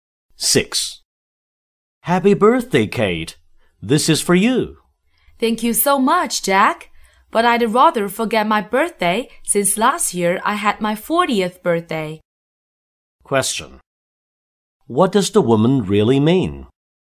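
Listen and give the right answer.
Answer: She doesn't want to be reminded of her age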